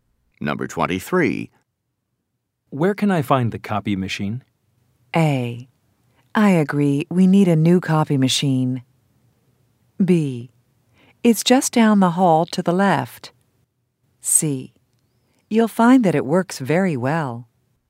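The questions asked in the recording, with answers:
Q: Where can I find the copy machine?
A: B: It's just down the hall to the left.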